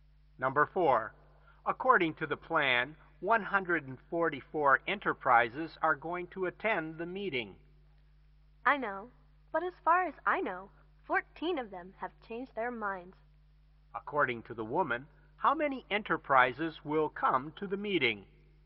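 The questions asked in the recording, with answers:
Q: According to the woman, how many enterprises will come to the meeting?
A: 130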